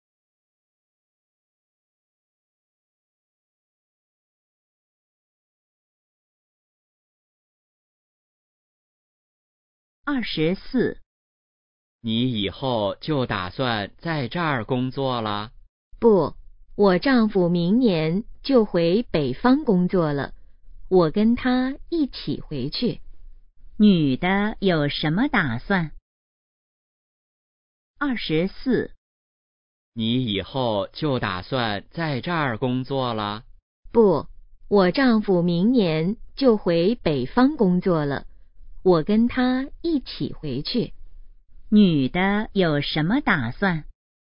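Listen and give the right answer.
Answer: 跟丈夫回北方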